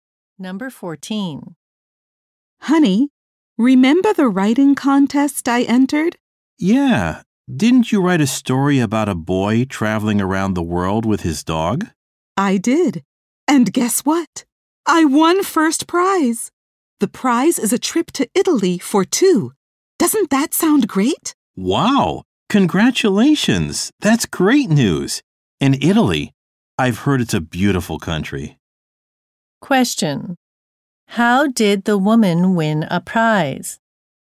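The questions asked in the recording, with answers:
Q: How did the woman win a prize?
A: By winning a writing contest with her story.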